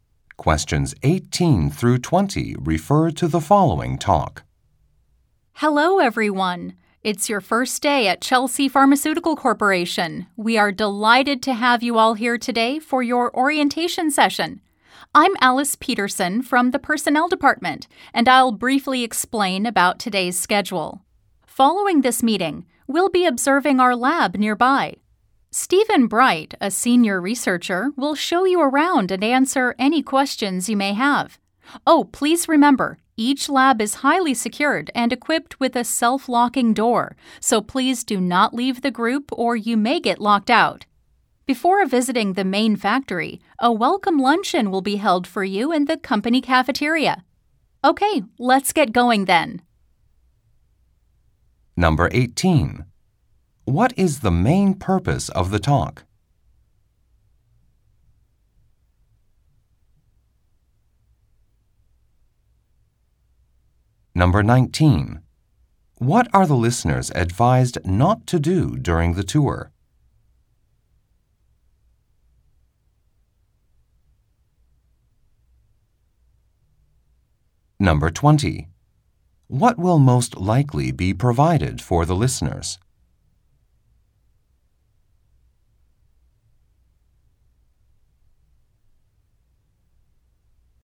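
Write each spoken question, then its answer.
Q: What is the main purpose of the talk?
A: To explain the schedule of the new employees' orientation

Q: What are the listeners advised not to do during the tour?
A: Leave the group

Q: What will most likely be provided for the listeners?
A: A welcome lunch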